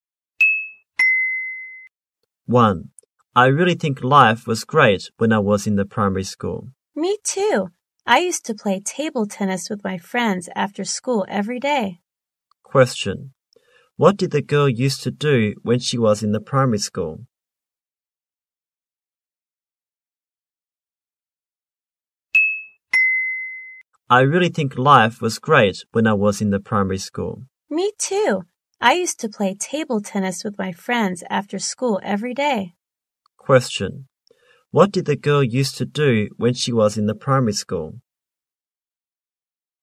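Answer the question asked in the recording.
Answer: She used to play table tennis with her friends after school every day.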